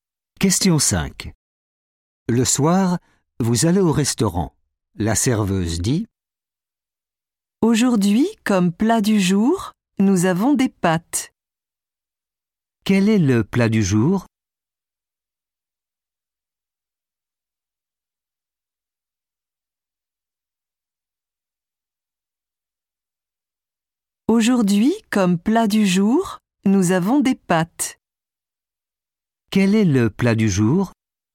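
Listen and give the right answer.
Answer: des pâtes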